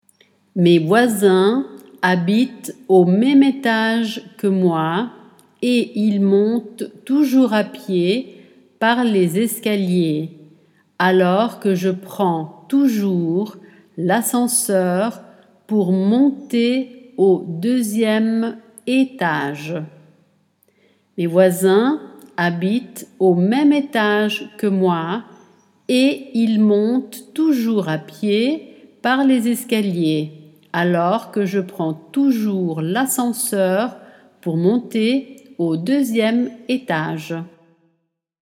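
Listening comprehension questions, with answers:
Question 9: Mes voisins que moi et alors que au deuxième étage.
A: habitent au même étage / ils montent toujours à pied par les escaliers, / je prends toujours l'ascenseur pour monter

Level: A2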